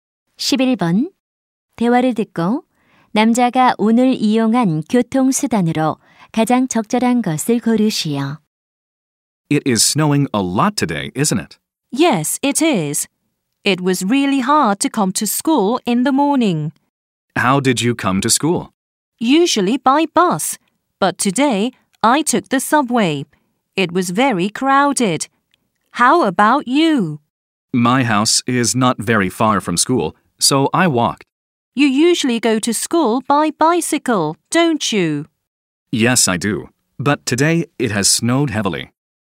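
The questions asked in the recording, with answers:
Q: 대화를 듣고 남자가 오늘 이용한 교통수단으로 가장 적절한 것을 고르시오.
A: 지하철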